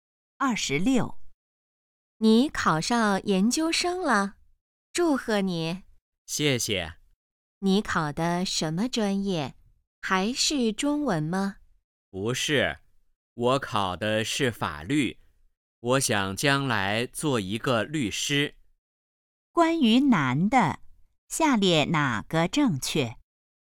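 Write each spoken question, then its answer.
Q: 关于男的,下列哪个正确?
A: 考上了法律专业的研究生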